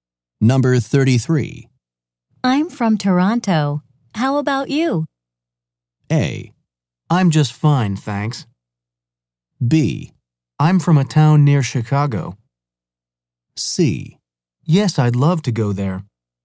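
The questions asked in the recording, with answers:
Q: I'm from Toronto. How about you?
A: B: I'm from a town near Chicago.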